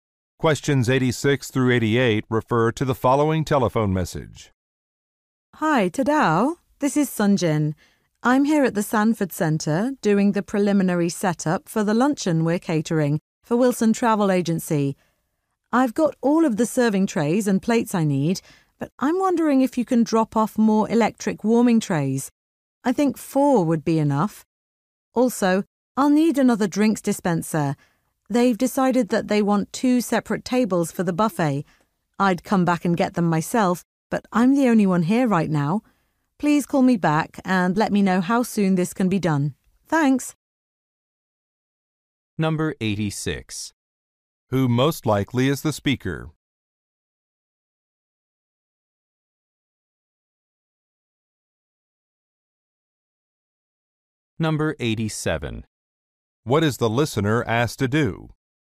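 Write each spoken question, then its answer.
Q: Who most likely is the speaker?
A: A caterer

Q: What is the listener asked to do?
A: Drop off more warming trays and a drinks dispenser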